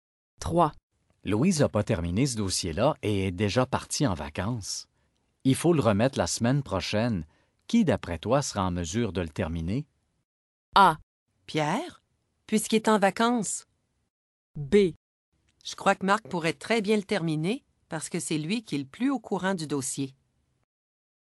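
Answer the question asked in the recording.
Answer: B: Je crois que Marc pourrait très bien le terminer parce que c'est lui qui est le plus au courant du dossier.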